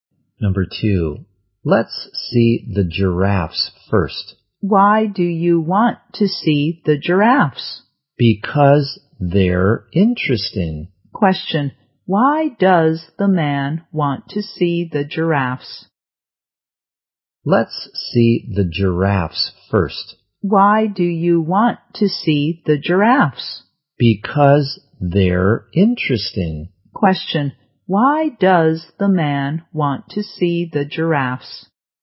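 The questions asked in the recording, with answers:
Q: why does the man want to see the giraffes?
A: Because they're interesting.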